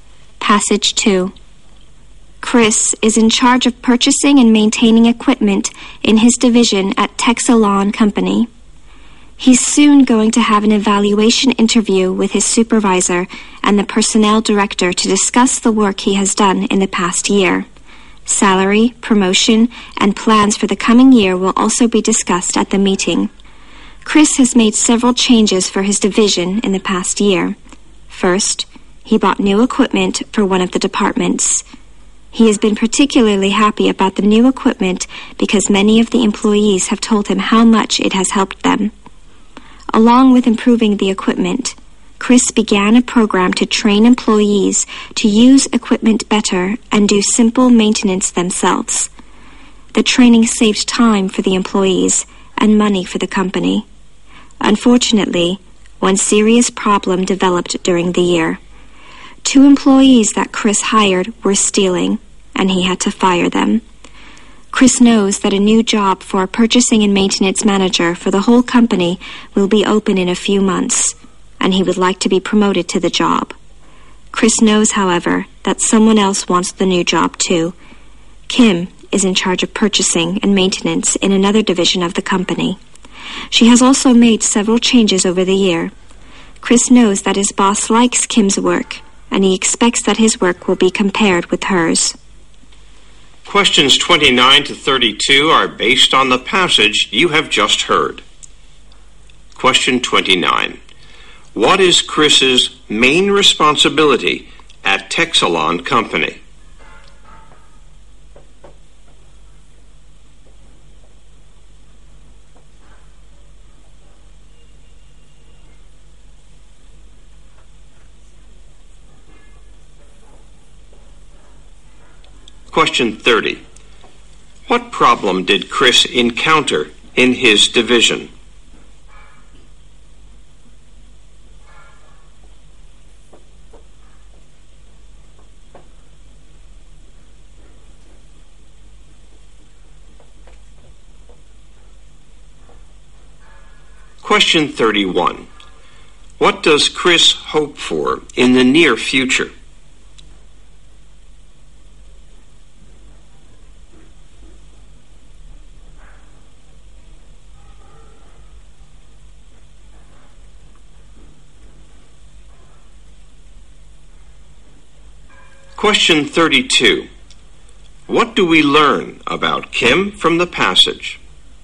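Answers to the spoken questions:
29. Buying and maintaining equipment
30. Two employees he hired were stealing
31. To be promoted to purchasing and maintenance manager for the whole company
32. She is competing with Chris for the new job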